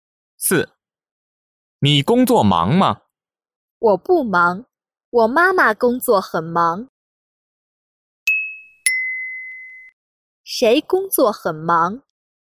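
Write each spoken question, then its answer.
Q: 谁工作很忙?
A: 我妈妈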